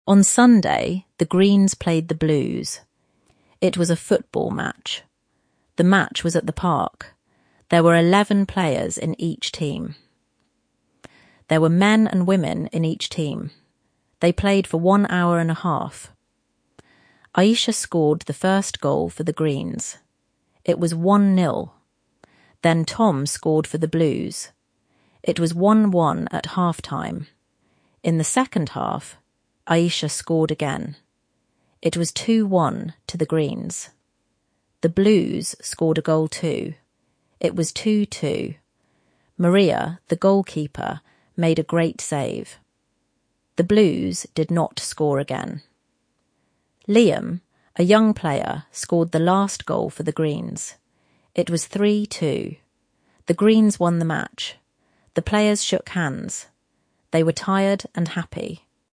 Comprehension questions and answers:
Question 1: How many players were in each team?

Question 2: Who scored the first goal?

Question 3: What was the score at half-time?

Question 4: How many goals did Aisha score?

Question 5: Who is Maria?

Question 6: Who scored the last goal?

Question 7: Who won the match?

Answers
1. Eleven.
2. Aisha (for the Greens).
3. 1–1.
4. Two — one in the first half and one in the second half.
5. The goalkeeper. She made a great save.
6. Liam — a young player on the Greens team.
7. The Greens. The final score was 3–2.

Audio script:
On Sunday, the Greens played the Blues. It was a football match. The match was at the park.
There were eleven players in each team. There were men and women in each team. They played for one hour and a half.
Aisha scored the first goal for the Greens. It was 1–0.
Then Tom scored for the Blues. It was 1–1 at half-time.
In the second half, Aisha scored again. It was 2–1 to the Greens.
The Blues scored a goal too. It was 2–2.
Maria, the goalkeeper, made a great save. The Blues did not score again.
Liam, a young player, scored the last goal for the Greens. It was 3–2.
The Greens won the match. The players shook hands. They were tired and happy.